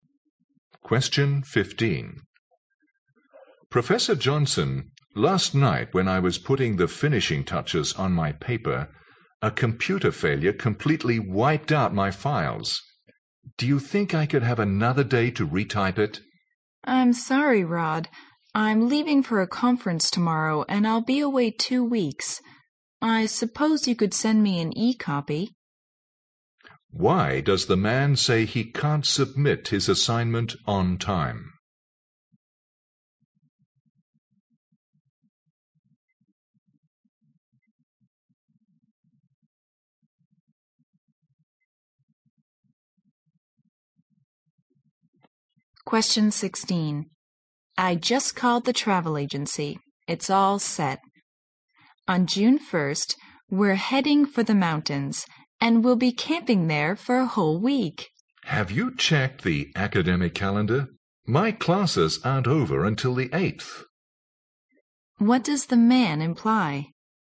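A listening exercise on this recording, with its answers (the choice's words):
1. Why does the man say he can't submit his assignment on time?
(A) He needs help to retrieve his files.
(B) He has to type his paper once more.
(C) He needs some time to polish his paper.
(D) He will be away for a two-week conference.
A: He has to type his paper once more.

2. What does the man imply?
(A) They might have to change their plan.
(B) He has got everything set for their trip.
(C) He has a heavier workload than the woman.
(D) They could stay in the mountains until June 8.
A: They might have to change their plan.

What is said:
M: Professor Johnson, last night when I was putting the finishing touches on my paper, a computer failure completely wiped out my files. Do you think I could have another day to retype it?
W: I'm sorry Rod. I'm leaving for a conference tomorrow and I'll be away two weeks. I suppose you could send me an e-copy.
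Q: Why does the man say he can't submit his assignment on time?
W: I just called the travel agency. It's all set. On June 1st, we are heading for the mountains, and we'll be camping there for a whole week.
M: Have you checked the academic calendar? My classes aren't over until the 8th.
Q: What does the man imply?

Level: 六级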